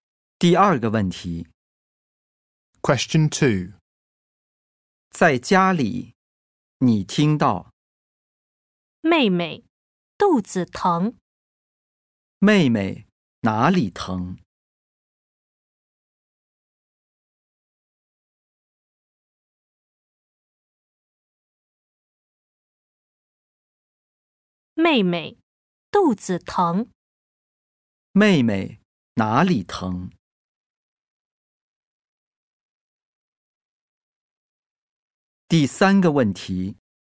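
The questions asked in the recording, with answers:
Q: 妹妹哪里疼?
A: 肚子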